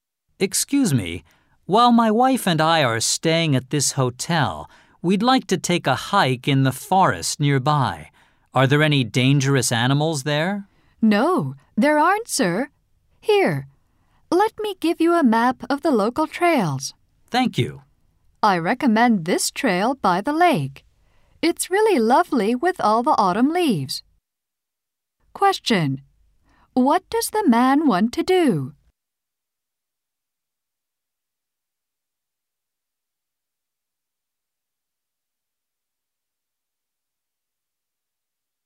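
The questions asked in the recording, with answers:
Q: What does the man want to do?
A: Go hiking in the forest near the hotel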